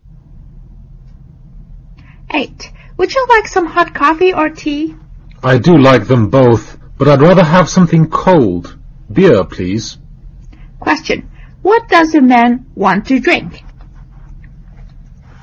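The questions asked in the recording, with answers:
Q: What does a man want to drink?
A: Beer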